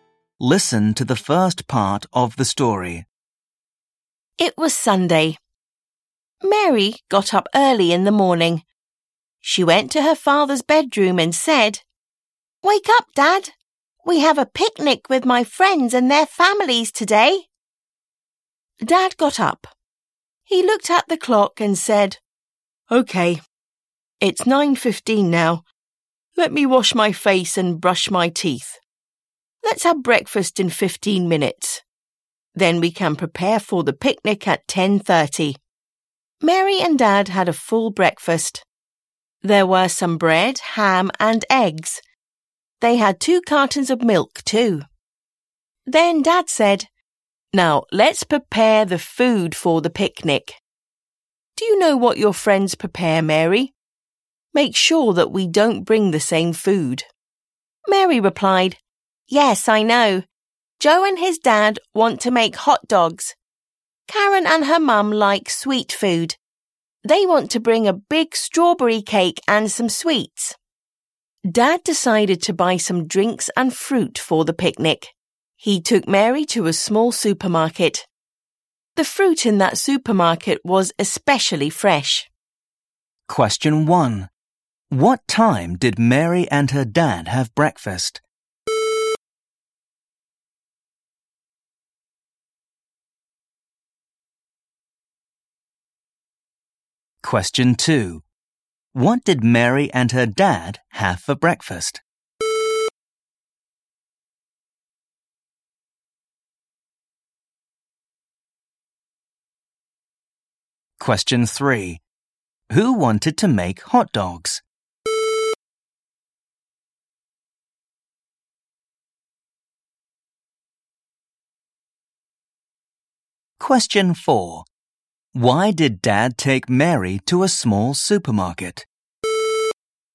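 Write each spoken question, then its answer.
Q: What time did Mary and her dad have breakfast?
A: At 9:30

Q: What did Mary and her dad have for breakfast?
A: Bread, ham, eggs and milk

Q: Who wanted to make hot dogs?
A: Joe and his dad

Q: Why did Dad take Mary to a small supermarket?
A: The fruit there was especially fresh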